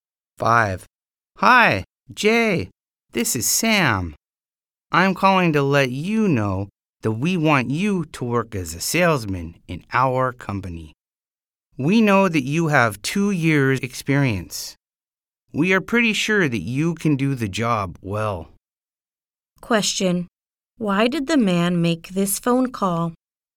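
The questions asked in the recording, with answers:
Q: Why did the man make this phone call?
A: To offer Jay a job as a salesman in his company.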